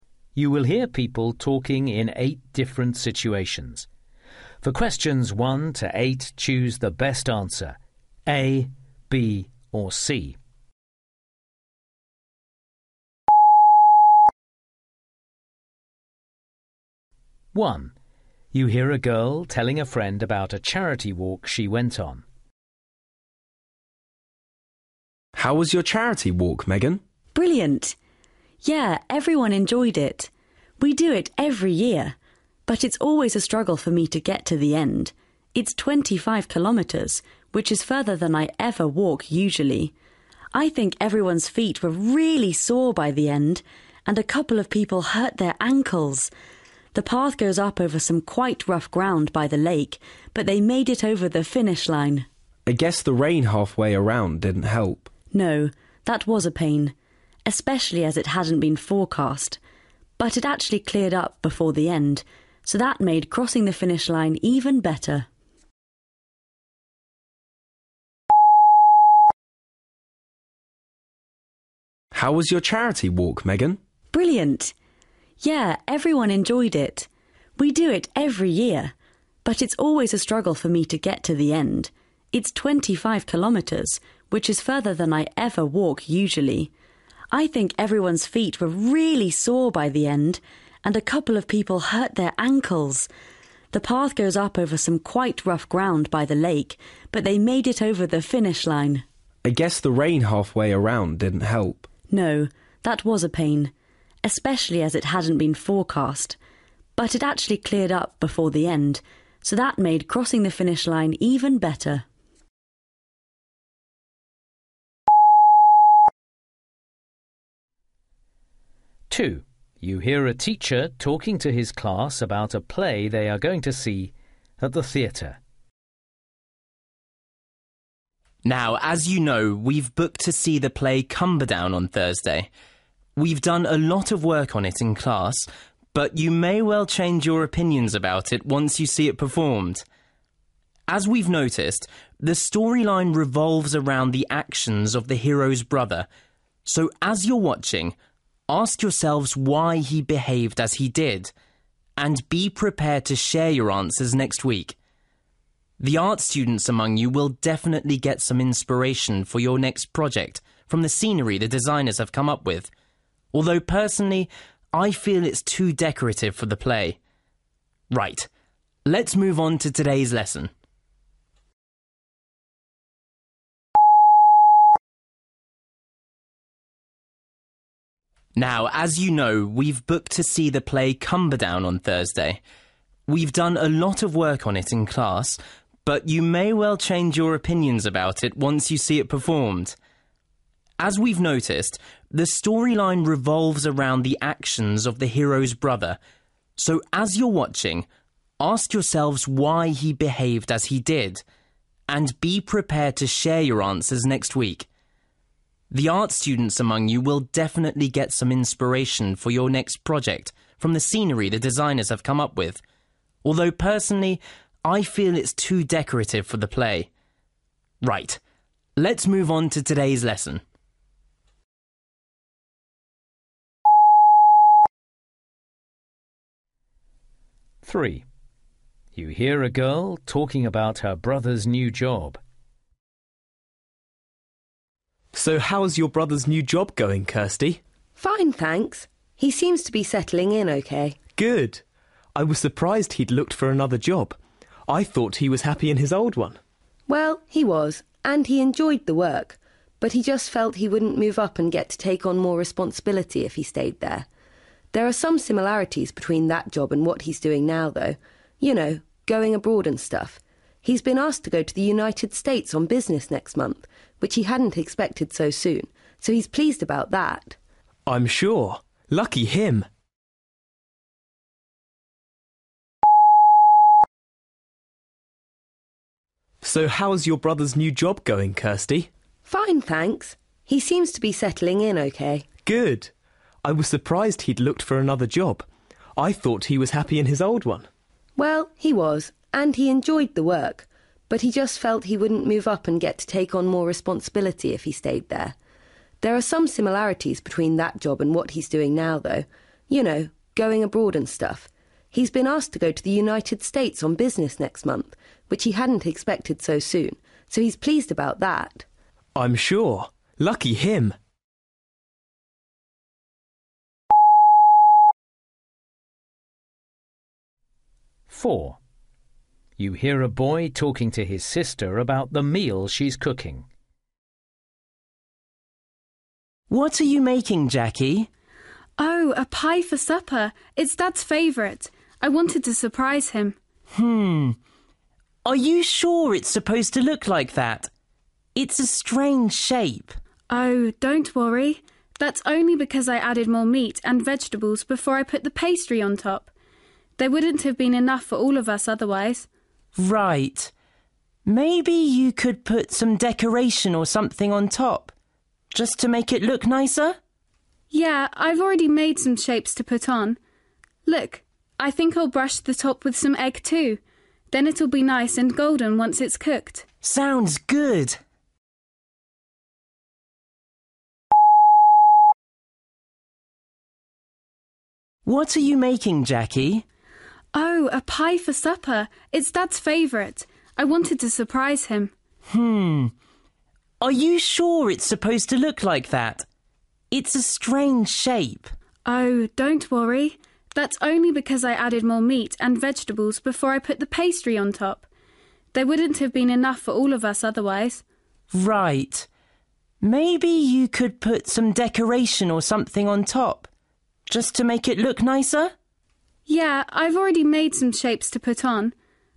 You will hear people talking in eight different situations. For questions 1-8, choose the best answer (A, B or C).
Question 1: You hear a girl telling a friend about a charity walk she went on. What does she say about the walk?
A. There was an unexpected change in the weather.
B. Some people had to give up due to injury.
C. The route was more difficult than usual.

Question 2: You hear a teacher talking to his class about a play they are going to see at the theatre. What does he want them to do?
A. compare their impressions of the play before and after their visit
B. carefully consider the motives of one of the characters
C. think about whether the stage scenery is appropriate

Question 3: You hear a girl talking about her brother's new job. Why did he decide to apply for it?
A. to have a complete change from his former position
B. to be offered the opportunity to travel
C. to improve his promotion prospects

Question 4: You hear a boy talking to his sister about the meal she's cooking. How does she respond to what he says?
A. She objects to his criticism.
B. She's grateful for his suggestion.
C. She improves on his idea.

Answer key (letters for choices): 1A, 2B, 3C, 4C

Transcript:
1
Tim: How was your charity walk, Megan?
Megan: Brilliant! Yeah, everyone enjoyed it. We do it every year, but it's always a struggle for me to get to the end – it's 25km, which is further than I ever walk usually! I think everyone's feet were really sore by the end, and a couple of people hurt their ankles – the path goes up over some quite rough ground by the late – but they made it over the finish line.
Tim: I guess the rain halfway around didn't help.
Megan: No, that was a pain, especially as it hadn't been forecast. But it actually cleared up before the end, so that make crossing the finish line even better!
2
Now as you know, we've booked to see the play Cumberdown on Thursday. We've done a lot of work on it in class, but you may well change your opinions about it once you see it performed! As we've noticed, the storyline revolves around the actions of the hero's brother, so as you're matching, ask yourselves why he behaved as he did – and be prepared to share your answers next week. The art students among you will definitely get some inspiration for your next project from the scenery the designers have come up with, although personally I feel it's too decorative for the play. Right, let's move on to today's lesson ...
Darren: So how's your brother's new job going, Kirstie?
Kirstie: Fine, thanks – he seems to be settling in OK.
Darren: Good. I was surprised he's looked for another job. I thought he was happy in his old one.
Kirstie: Well, he was, and he enjoyed the work, but he just felt he wouldn't move up and get to take on more responsibility if he stayed there. There are some similarities between that job and what he's doing now, though – you know, going abroad and stuff. He's been asked to go to the United States on business next month, which he hadn't expected so soon, so he's pleased about that.
Darren: I'm sure – lucky him!
Andrew: What are you making, Jackie?
Jackie: Oh, a pie for supper – it's Dad's favourite. I wanted to surprise him.
Andrew: Hmm ... are you sure it's supposed to look like that? It's a strange shape.
Jackie: Oh, don't worry – that's only because I added more meat and vegetables before I put the pastry on top. There wouldn't have been enough for all of us otherwise.
Andrew: Right. Maybe you could put some decoration or something on top, just to make it look nicer?
Jackie: Yeah, I've already made some shapes to put on. Look. I think I'll brush the top with some egg, too – then it'll be nice and golden once it's cooked!
Andrew: Sounds good!
Saskia: Who's that boy in the photo, Sam?